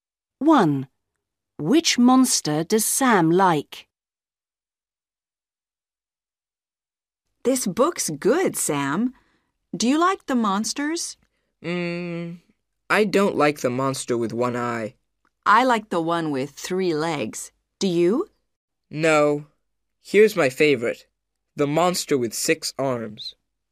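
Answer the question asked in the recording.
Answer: The monster with six arms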